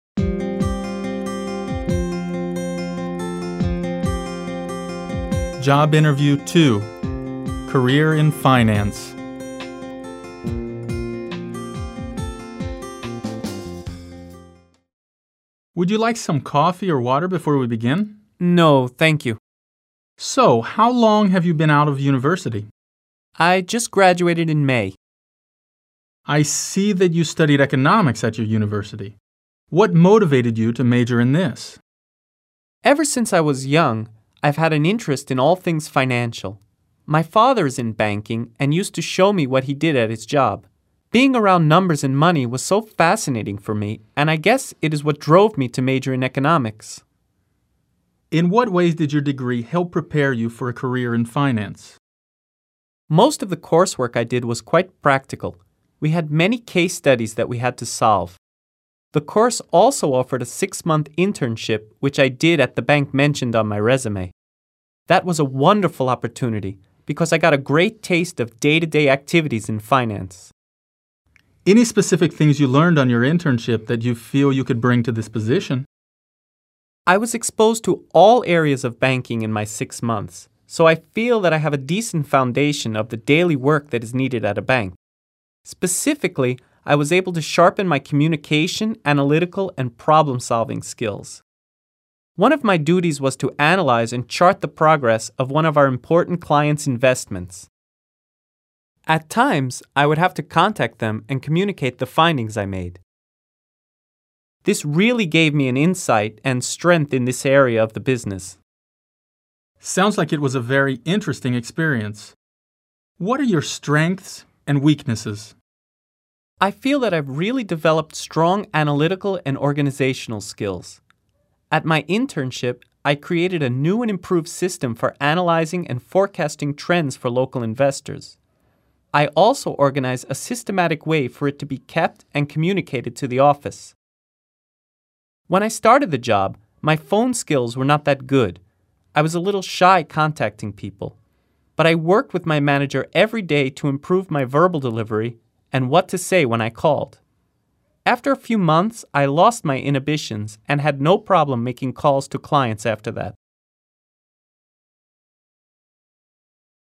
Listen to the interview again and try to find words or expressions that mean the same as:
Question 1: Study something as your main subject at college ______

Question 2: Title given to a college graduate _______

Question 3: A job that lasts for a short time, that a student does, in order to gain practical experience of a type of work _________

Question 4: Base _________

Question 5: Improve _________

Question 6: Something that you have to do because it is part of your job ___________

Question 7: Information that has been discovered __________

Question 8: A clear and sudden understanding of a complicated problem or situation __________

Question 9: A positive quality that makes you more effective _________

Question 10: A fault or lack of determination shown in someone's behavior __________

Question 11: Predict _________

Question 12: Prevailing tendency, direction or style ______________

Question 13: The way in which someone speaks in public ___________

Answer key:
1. Major
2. Degree
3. Internship
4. Foundation
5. Sharpen
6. Duty
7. Findings
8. Insight
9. Strength
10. Weakness
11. Forecast
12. Trend
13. Verbal delivery

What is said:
Career in Finance
Interviewer: Would you like some coffee or water before we begin?
Interviewee: No, thank you.
Interviewer: So, how long have you been out of university?
Interviewee: I just graduated in May.
Interviewer: I see that you studied economics at your university. What motivated you to major in this?
Interviewee: Ever since I was young, I have had an interest in all things financial. My father is in banking and used to show me what he did at his job. Being around numbers and money was so fascinating for me and I guess it is what drove me to major in economics.
Interviewer: In what ways did your degree help prepare you for a career in finance?
Interviewee: Most of the coursework I did was quite practical. We had many case studies that we had to solve. The course also offered a six month internship, which I did at a the bank mentioned on my résumé. That was a wonderful opportunity because I got a great taste of day-to-day activities in finance.
Interviewer: Any specific things you learned on your internship that you feel you could bring to this position?
Interviewee: I was exposed to all areas of banking in my six months, so I feel that I have a decent foundation of the daily work that is needed at a bank. Specifically, I was able to sharpen my communication, analytical and problem solving skills. One of my duties was to analyze and chart the progress of one of our important client's investments. At times, I would have to contact them and communicate the findings I made. This really gave me an insight and strength in this area of the business.
Interviewer: Sounds like it was a very interesting experience. What are your strengths and weaknesses?
Interviewee: I feel that I have really developed strong analytical and organizational skills. At my internship, I created a new and improved system for analyzing and forecasting trends for local investors. I also organized a systematic way for it to be kept and communicated to the office. When I started the job, my phone skills were not that good. I was a little shy contacting people. But I worked with my manager every day to improve my verbal delivery and what to say when I called. After a few months, I lost my inhibitions and had no problem making calls to clients after that.

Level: B2-level students